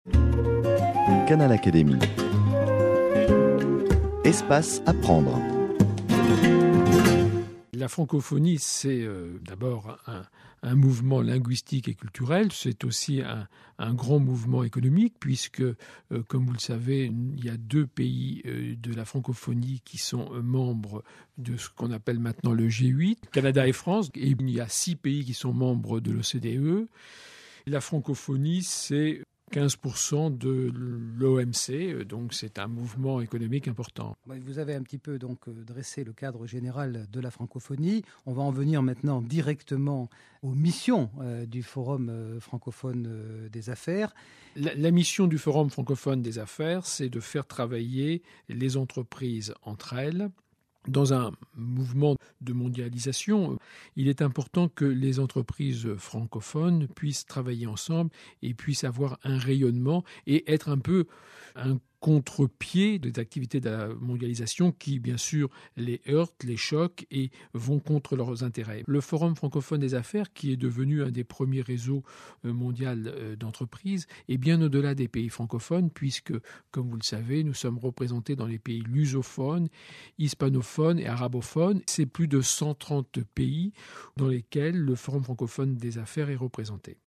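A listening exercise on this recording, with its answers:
Écoutez l'audio et répondez aux questions.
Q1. C'est un poids important : la France et le font partie du pays appartiennent à l' ; la Francophonie représente de l'.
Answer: économique ; Canada ; G8 ; six ; OCDE ; 15% ; OMC

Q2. Le forum favorise les entre les entreprises dans le cadre de la .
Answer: collaborations (travail) ; mondialisation

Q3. Oui, il est présent dans des pays lusophones, et .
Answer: hispanophones ; arabophones

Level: DALF C1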